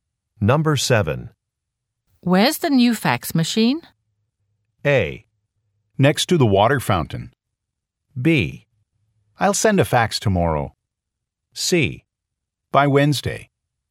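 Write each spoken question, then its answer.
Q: Where's the new fax machine?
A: A: Next to the water fountain.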